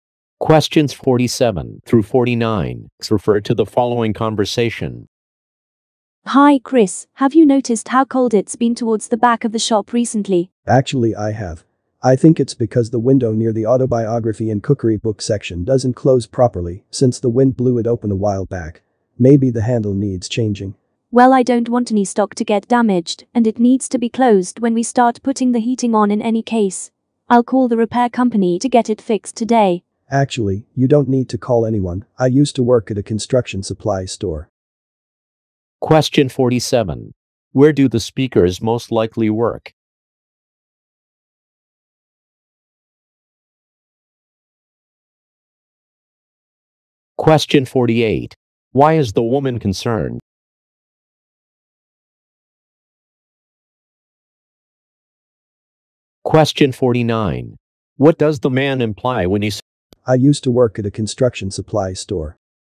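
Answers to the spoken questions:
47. In a bookstore
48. Stock might get damaged
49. He can fix the window himself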